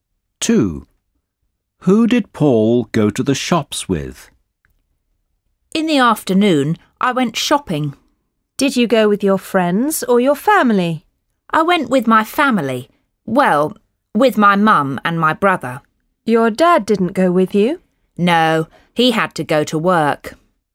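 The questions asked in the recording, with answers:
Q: Who did Paul go to the shops with?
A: His mum and his brother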